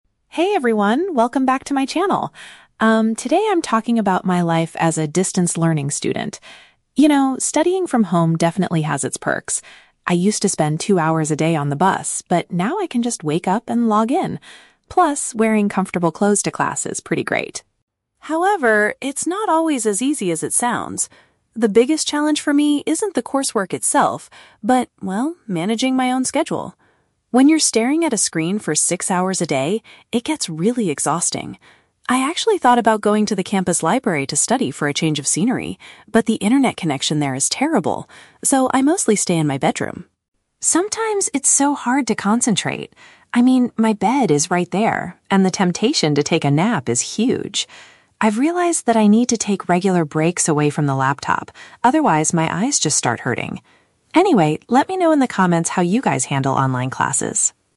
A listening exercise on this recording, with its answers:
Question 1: What does the speaker mention as a benefit of distance learning?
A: She saves time on transportation.

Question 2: What is the most difficult part of online learning for the speaker?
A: Organizing her time and staying focused.

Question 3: Why doesn't the speaker go to the library to study?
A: The Wi-Fi network there is very poor.

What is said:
Vlogger: "Hey everyone, welcome back to my channel. Um, today I'm talking about my life as a distance learning student. You know, studying from home definitely has its perks. I used to spend two hours a day on the bus, but now I can just wake up and log in. Plus, wearing comfortable clothes to class is pretty great.
However, it's not always as easy as it sounds. The biggest challenge for me isn't the coursework itself, but, well, managing my own schedule. When you're staring at a screen for six hours a day, it gets really exhausting. I actually thought about going to the campus library to study for a change of scenery, but the internet connection there is terrible. So, I mostly stay in my bedroom.
Sometimes, it's so hard to concentrate. I mean, my bed is right there, and the temptation to take a nap is huge! I've realized that I need to take regular breaks away from the laptop; otherwise, my eyes just start hurting. Anyway, let me know in the comments how you guys handle online classes!"